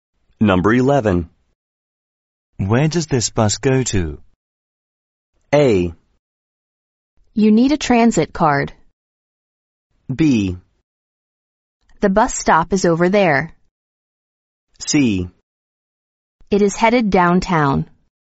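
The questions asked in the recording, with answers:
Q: Where does this bus go to?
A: C: It is headed downtown.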